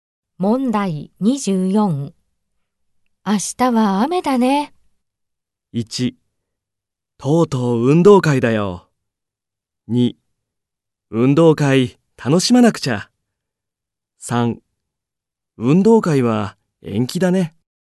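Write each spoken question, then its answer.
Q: 明日は雨だね。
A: 3: 運動会は延期だね。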